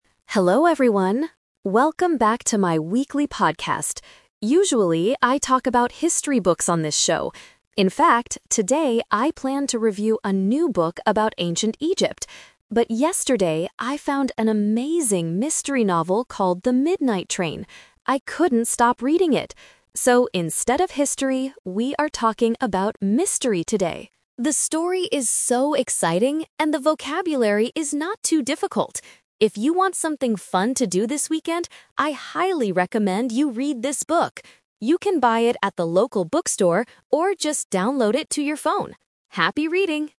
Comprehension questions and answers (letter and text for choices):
Listen to the podcast and choose the correct answer (A, B, or C).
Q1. What did the podcaster originally plan to talk about today?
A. A mystery novel.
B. A history book.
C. A comic book.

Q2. What kind of book is The Midnight Train?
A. A mystery novel.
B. A history book about Egypt.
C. A science fiction novel.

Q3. What does the podcaster suggest the listeners do this weekend?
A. Go to a museum in Egypt.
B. Write their own mystery story.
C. Read The Midnight Train.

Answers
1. B. A history book.
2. A. A mystery novel.
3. C. Read The Midnight Train.

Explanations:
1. The podcaster says, "today I planned to review a new book about ancient Egypt" (which is a history book). Option A is the Trap (it is what he actually talks about after he changes his mind). Option C is not mentioned.
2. The podcaster clearly states, "I found an amazing mystery novel called The Midnight Train." Option B is the Trap (it was the topic of the book he originally wanted to review). Option C is not mentioned.
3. This is the main suggestion of the audio. The podcaster says, "If you want something fun to do this weekend, I highly recommend you read this book" (referring to The Midnight Train). Option A is a Trap using the word "Egypt" from the audio. Option B is not mentioned.

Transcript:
Podcaster: Hello everyone, welcome back to my weekly podcast. Usually, I talk about history books on this show. In fact, today I planned to review a new book about ancient Egypt. But yesterday, I found an amazing mystery novel called The Midnight Train. I couldn't stop reading it! So, instead of history, we are talking about mystery today. The story is so exciting, and the vocabulary is not too difficult. If you want something fun to do this weekend, I highly recommend you read this book. You can buy it at the local bookstore, or just download it to your phone. Happy reading!

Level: A2